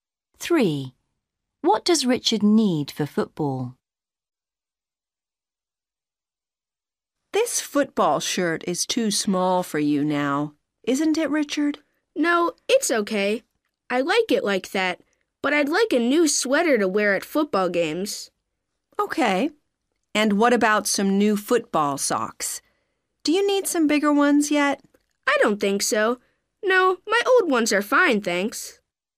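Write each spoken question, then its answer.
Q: What does Richard need for football?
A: a new sweater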